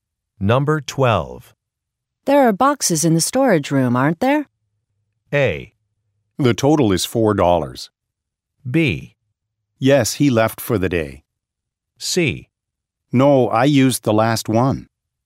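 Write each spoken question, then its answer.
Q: There are boxes in the storage room, aren't there?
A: C: No, I used the last one.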